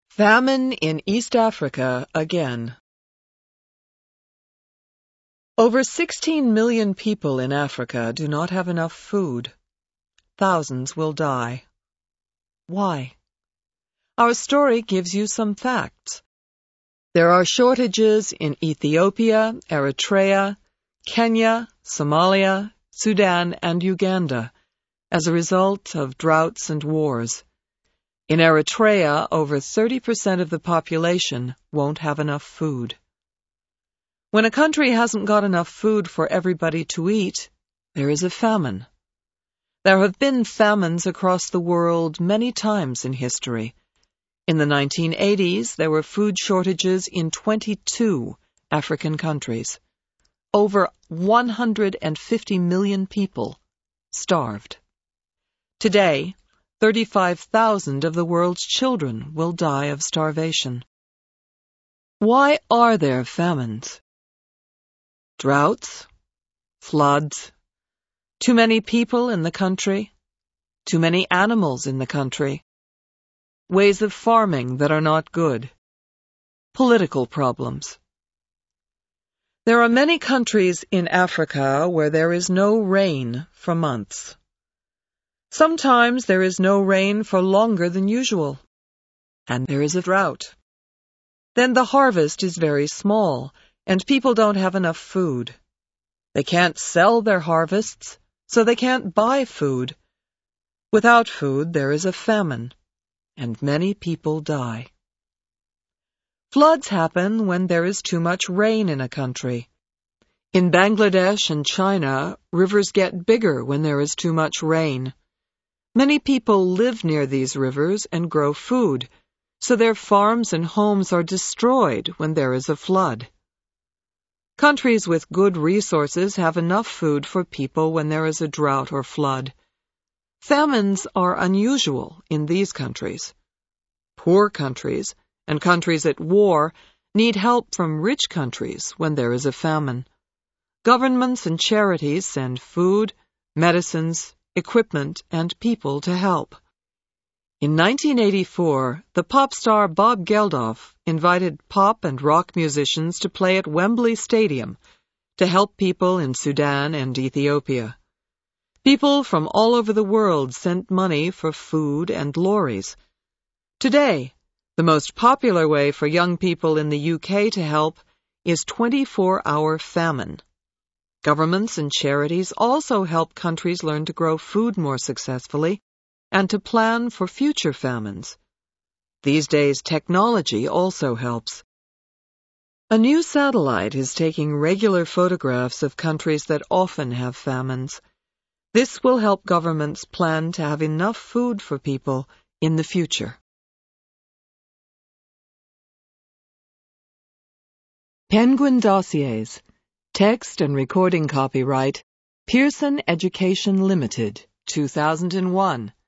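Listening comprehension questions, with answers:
Complete these sentences using a word from the menus:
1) In a drought no plants can grow and in a flood plants are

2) Millions of people in east Africa could suffer because of a .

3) Many young people help to send medicines and food by giving money to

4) The food shortage has happened because of and war.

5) In the future countries that often have famines will get help from photographs.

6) Poor countries that have a famine need help from other countries' .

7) happen when there is more rain than usual.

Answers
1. destroyed
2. famine
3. charities
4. droughts
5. satellite
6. governments
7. Floods

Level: HIGH INTERMEDIATE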